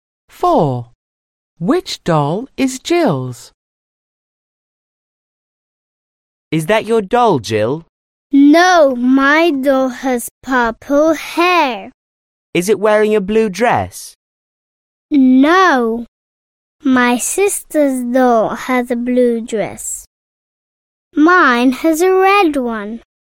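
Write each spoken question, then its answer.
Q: Which doll is Jill's?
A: The doll with purple hair and a red dress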